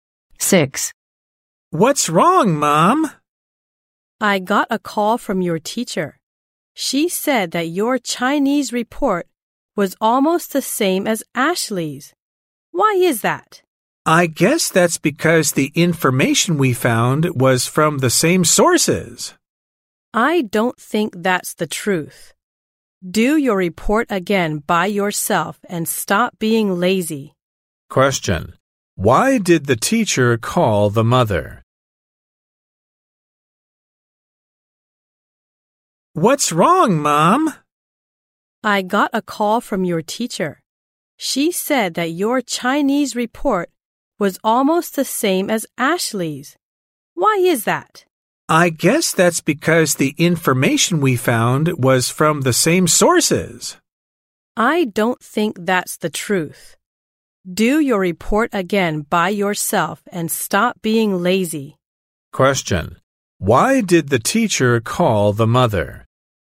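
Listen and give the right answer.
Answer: Because the child's Chinese report was almost the same as Ashley's.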